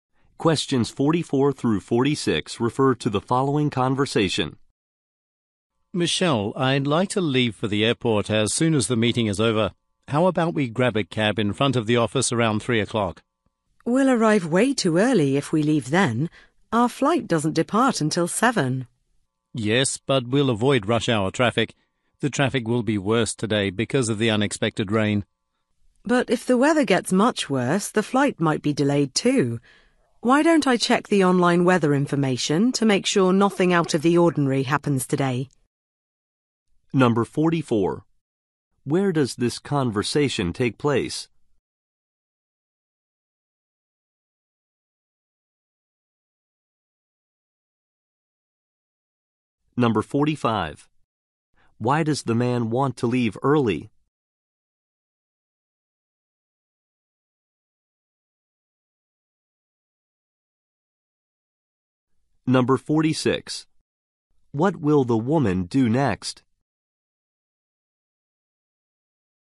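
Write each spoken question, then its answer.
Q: Why does the man want to leave early?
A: To avoid rush hour traffic

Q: What will the woman do next?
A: Check the online weather information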